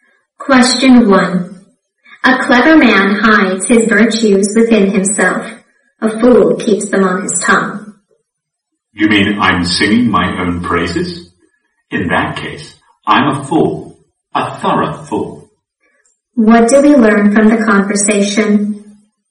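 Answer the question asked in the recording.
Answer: The man has been praising himself and admits he is a fool.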